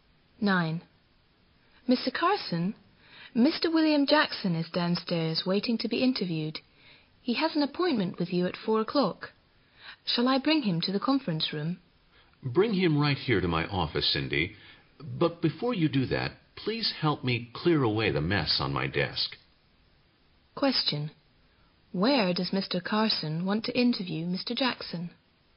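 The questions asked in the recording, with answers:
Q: Where does Mr. Carson want to interview Mr.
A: In his office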